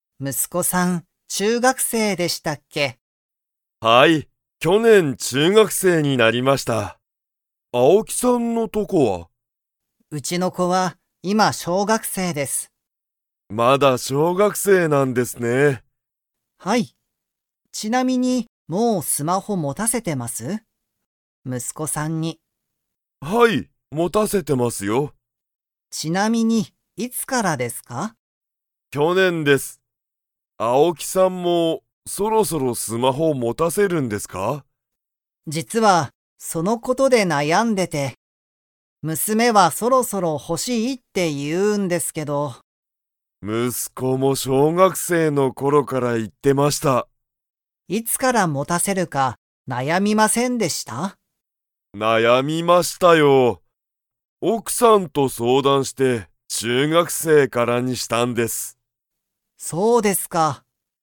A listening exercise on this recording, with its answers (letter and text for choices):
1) 工藤くどうさんの息子むすこは、いつ中学生ちゅうがくせいになりましたか?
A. 去年きょねん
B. 今年ことし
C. 昨日きのう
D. 今日きょう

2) 青木あおきさんは、娘むすめにスマホを持もたせるか 。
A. 悩なやんでいる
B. 悩なやんでいない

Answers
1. A. 去年きょねん
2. A. 悩なやんでいる

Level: Level 4